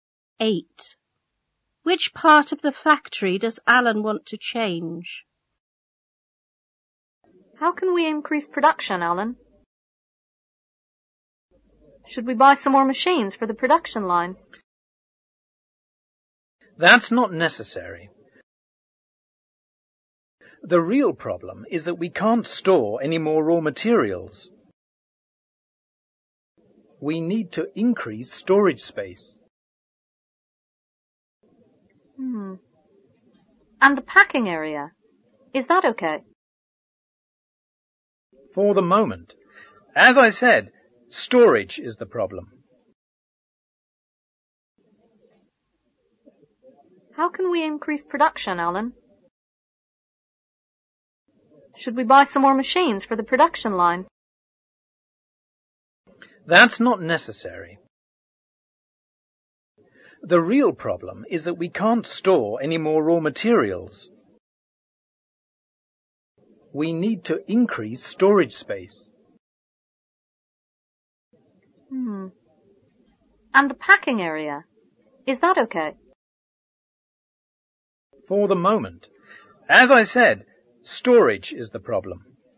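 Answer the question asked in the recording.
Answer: The storage area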